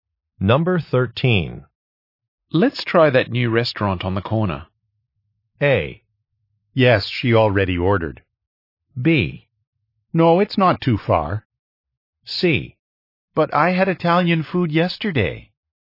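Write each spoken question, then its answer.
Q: Let's try that new restaurant on the corner.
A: C: But I had Italian food yesterday.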